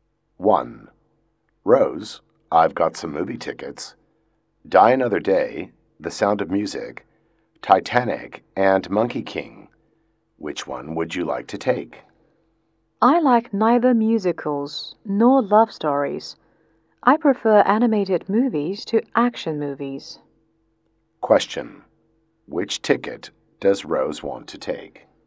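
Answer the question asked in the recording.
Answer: Monkey King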